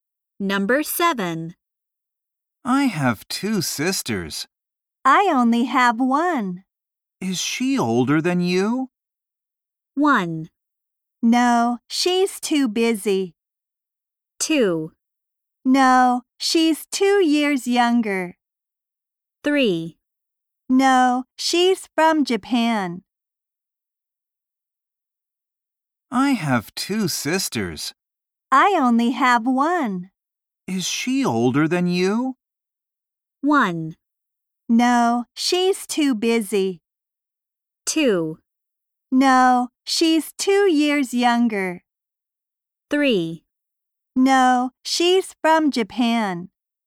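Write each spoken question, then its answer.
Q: Is she older than you?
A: 2: No, she's 2 years younger.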